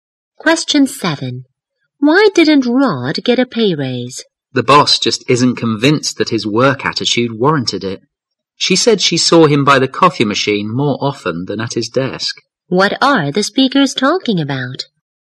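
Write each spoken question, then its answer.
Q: What are the speakers talking about?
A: Why Rod didn't get a pay raise (his poor work attitude)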